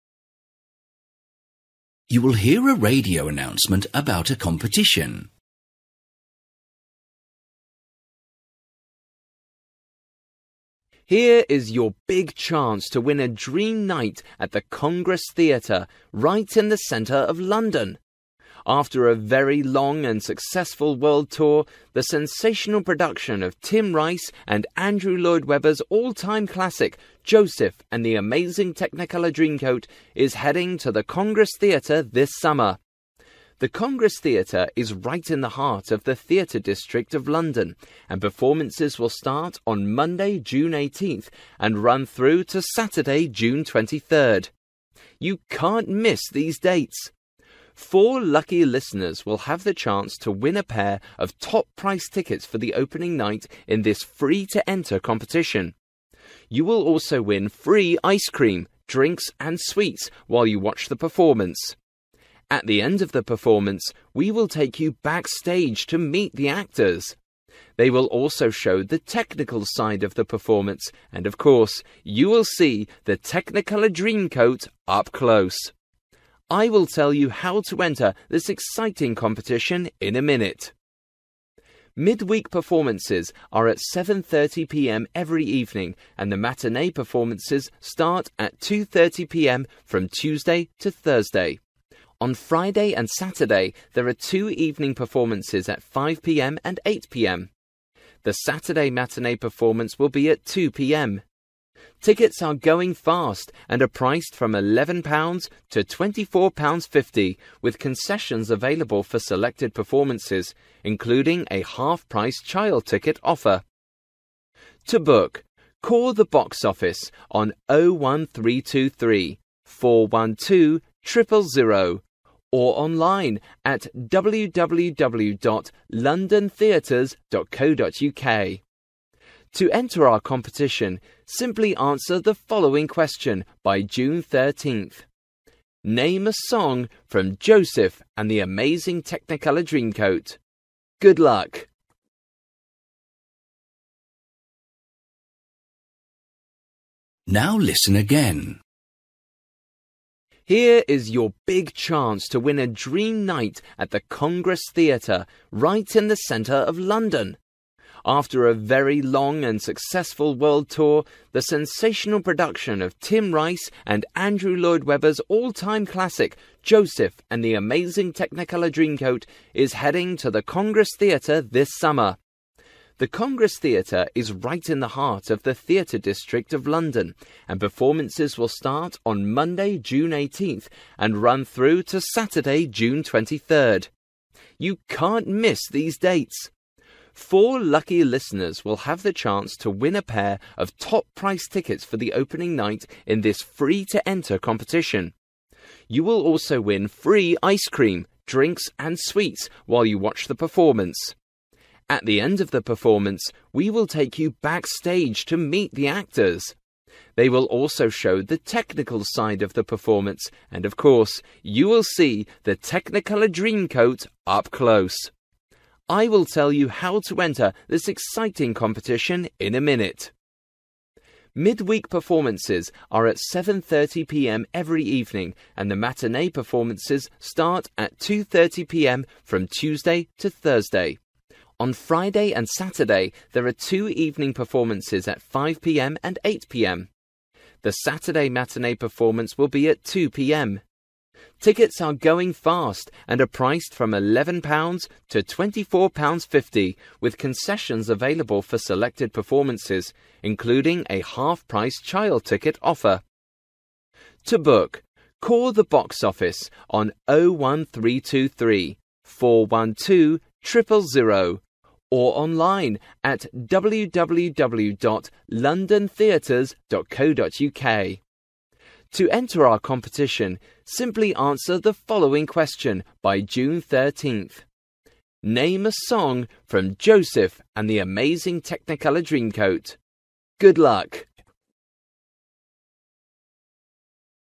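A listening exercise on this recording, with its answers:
For each question, write the correct answer in the gap. Write one or two words or a number or a date or a time.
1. from Monday, June 18th to Saturday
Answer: June 23rd

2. pairs of tickets.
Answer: four

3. chance to talk to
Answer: the actors

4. , at 2, 5 and 8pm.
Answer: performances

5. from £11.00 to £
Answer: 24.50

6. by phone or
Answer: online

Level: B1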